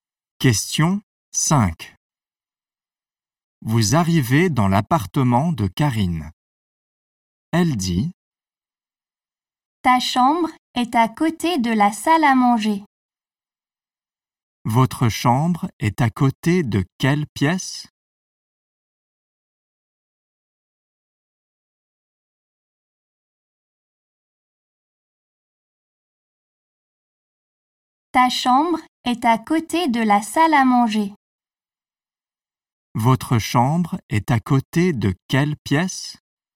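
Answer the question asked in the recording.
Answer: La salle à manger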